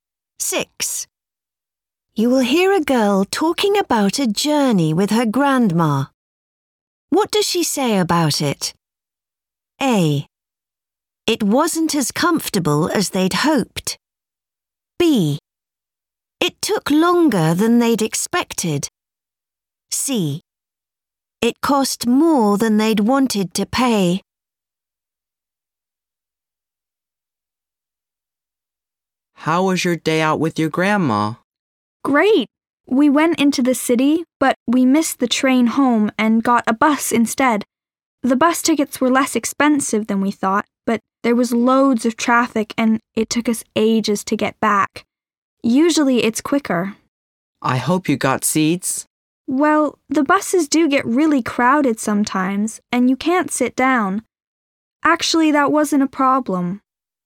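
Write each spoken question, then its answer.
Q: What does she say about it?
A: B: It took longer than they'd expected.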